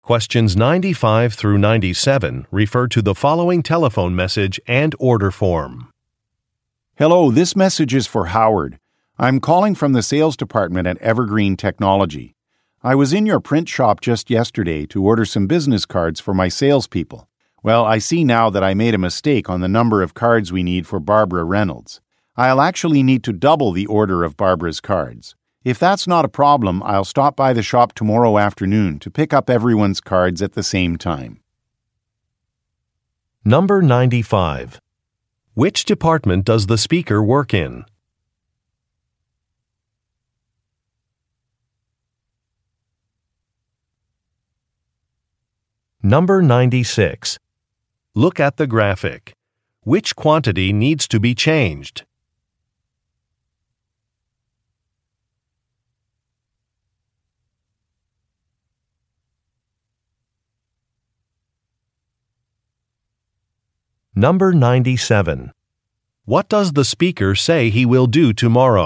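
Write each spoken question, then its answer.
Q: Which department does the speaker work in?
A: Sales

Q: What does the speaker say he will do tomorrow?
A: Stop by the shop to pick up the business cards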